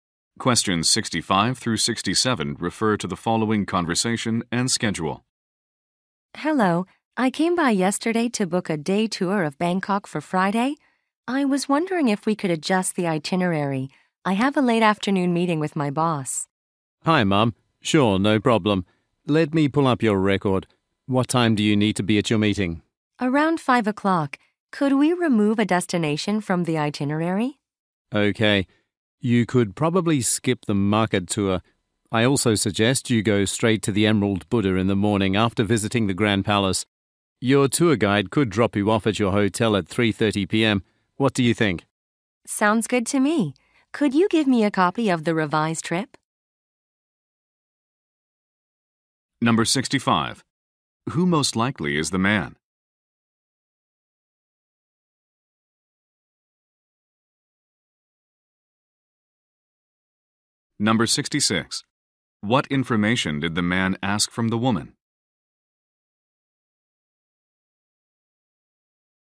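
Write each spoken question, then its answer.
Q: Who most likely is the man?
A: A travel agent.

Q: What information did the man ask from the woman?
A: The time of her meeting.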